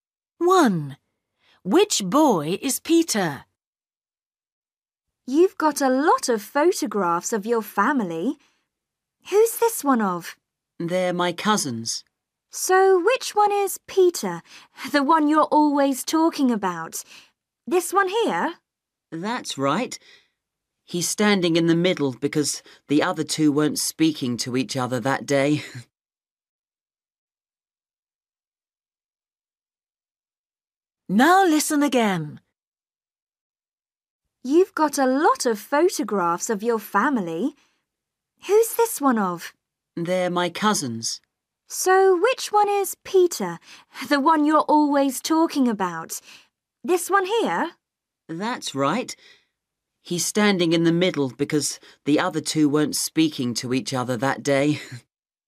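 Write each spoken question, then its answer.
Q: Which boy is Peter?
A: The one standing in the middle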